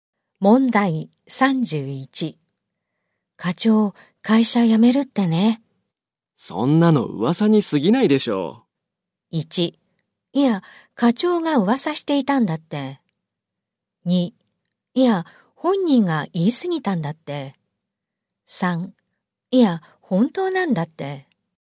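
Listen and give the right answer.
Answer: 3: いや、本当なんだって。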